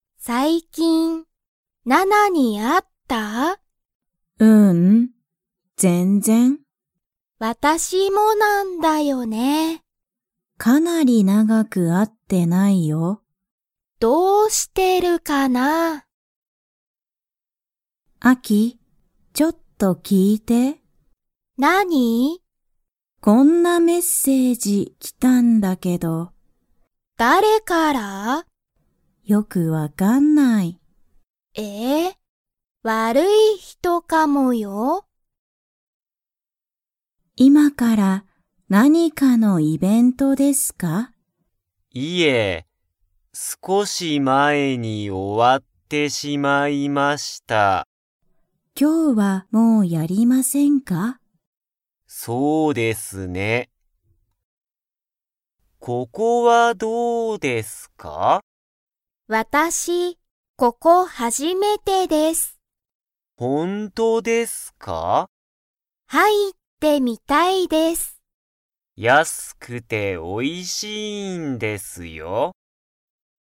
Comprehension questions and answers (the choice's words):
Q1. ジュンは、最近(さいきん)ナナに会(あ)いましたか?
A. はい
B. いいえ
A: いいえ

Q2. そのメッセージは____人(ひと)からかもしれない。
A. おいしい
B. 早(はや)い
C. 良(よ)い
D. 悪(わる)い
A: 悪(わる)い

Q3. そのイベントは、今いまからやりますか?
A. はい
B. いいえ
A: いいえ

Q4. この店(みせ)は安(やす)くて____。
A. 長(なが)い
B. おいしい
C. 悪(わる)い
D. 早(はや)い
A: おいしい

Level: Level 1